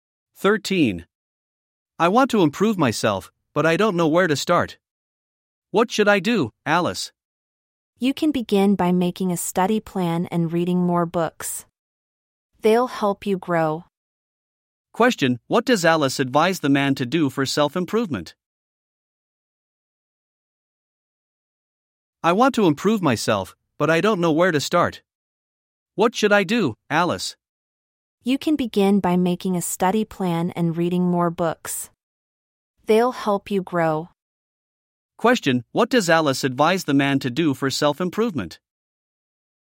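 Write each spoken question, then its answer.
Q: Question: What does Alice advise the man to do for self-improvement?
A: Make a study plan and read more books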